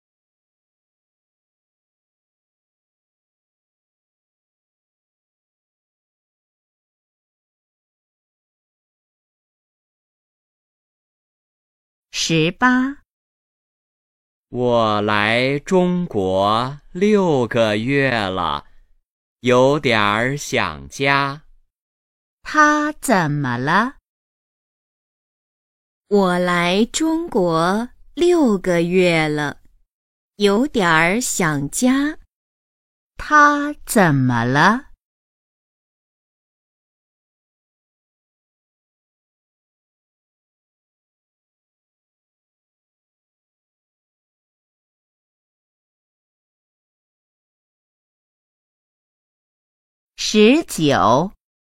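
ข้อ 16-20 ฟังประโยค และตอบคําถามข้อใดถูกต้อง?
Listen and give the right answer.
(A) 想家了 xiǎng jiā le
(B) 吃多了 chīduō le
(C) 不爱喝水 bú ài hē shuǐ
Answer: (A) 想家了 xiǎng jiā le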